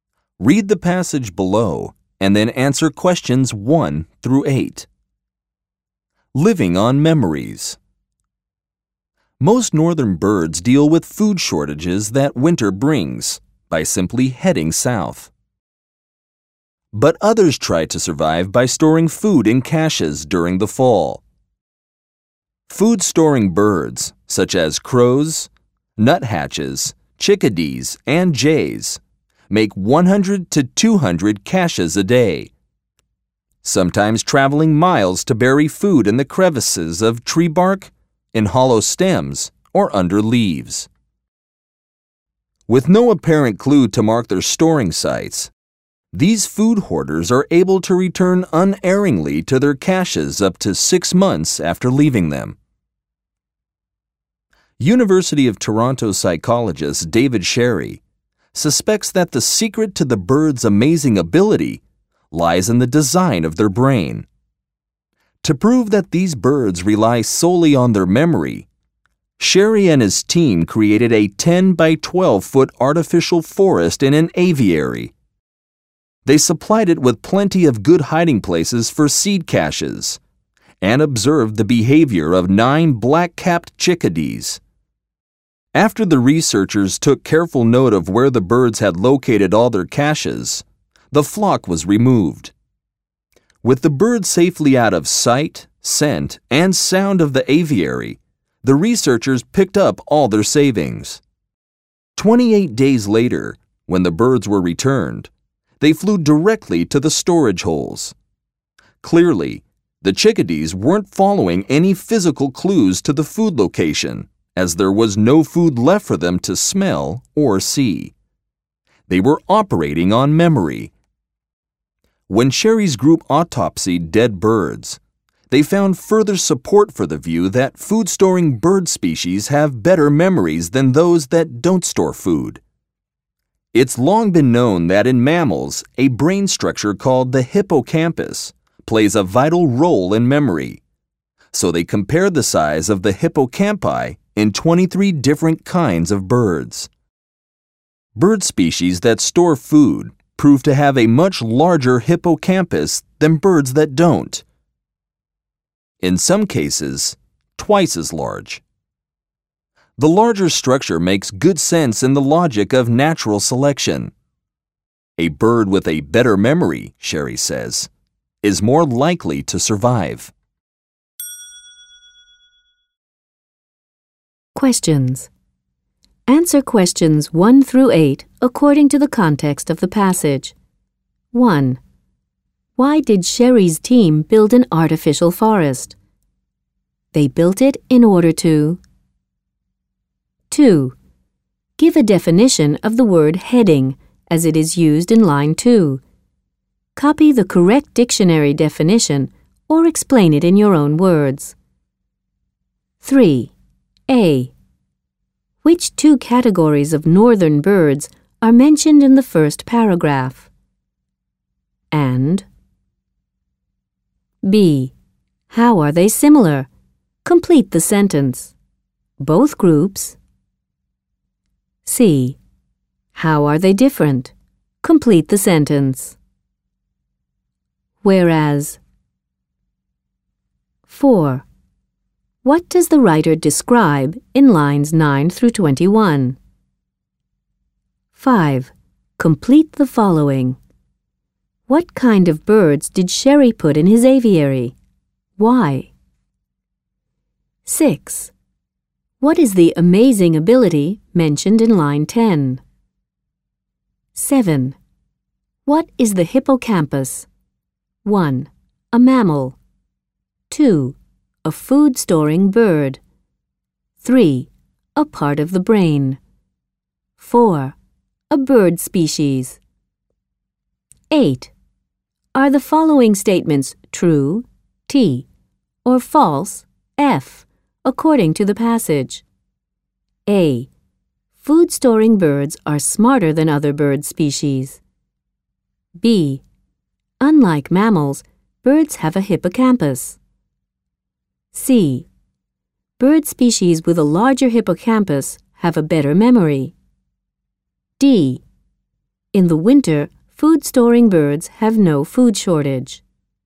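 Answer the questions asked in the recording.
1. To prove that the birds rely only on their memory
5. Black-capped chickadees
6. Finding their food caches again without mistakes, up to 6 months after storing them
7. 3: A part of the brain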